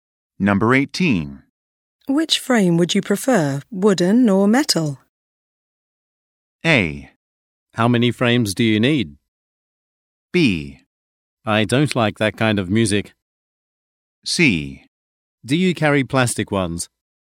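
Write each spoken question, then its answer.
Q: Which frame would you prefer, wooden or metal?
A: C: Do you carry plastic ones?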